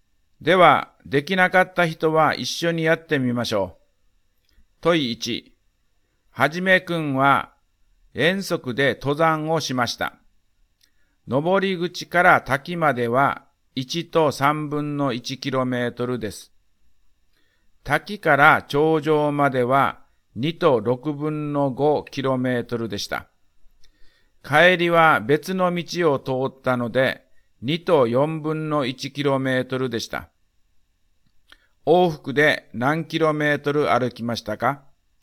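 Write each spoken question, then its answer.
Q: 往復で何キロメートル歩きましたか?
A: 6と12分の5キロメートル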